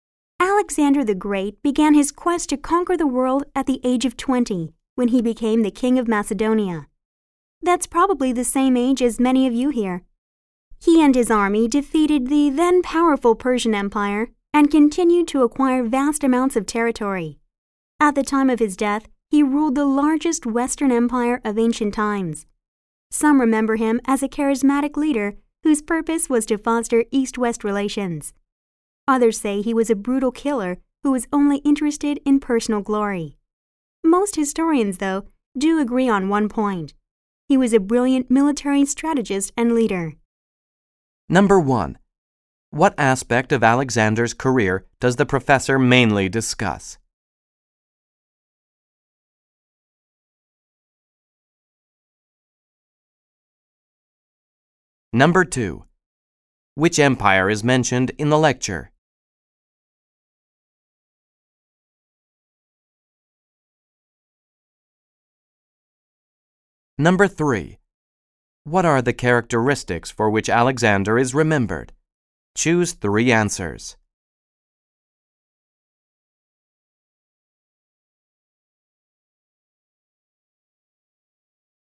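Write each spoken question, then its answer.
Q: Which empire is mentioned in the lecture?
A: The Persian Empire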